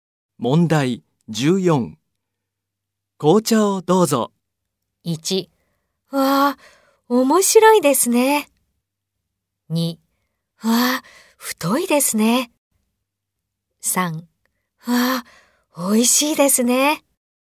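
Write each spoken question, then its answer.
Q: 紅茶をどうぞ。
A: 3: わあ、美味しいですね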